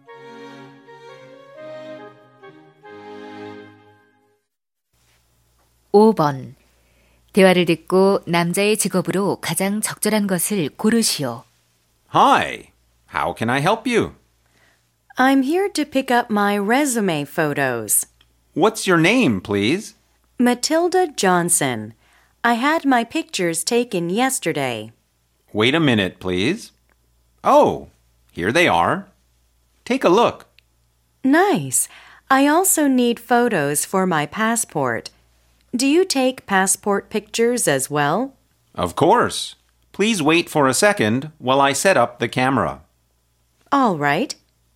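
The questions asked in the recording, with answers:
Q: 대화를 듣고 남자의 직업으로 가장 적절한 것을 고르시오.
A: 사진사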